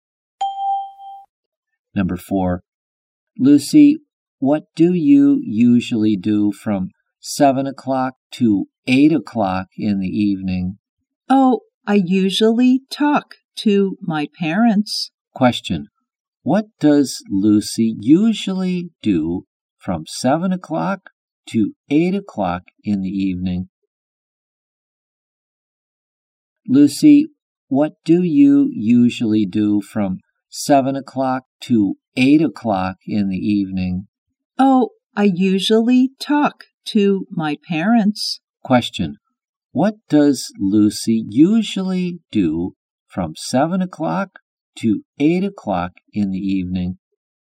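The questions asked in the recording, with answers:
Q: What does Lucy usually do from 7:00 to 8:00 in the evening?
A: She talks to her parents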